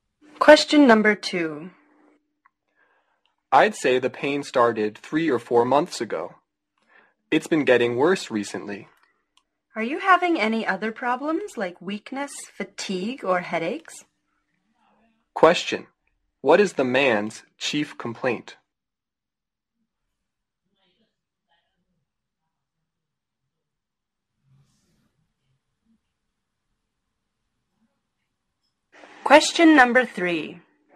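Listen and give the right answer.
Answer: Pain that started 3 or 4 months ago and has been getting worse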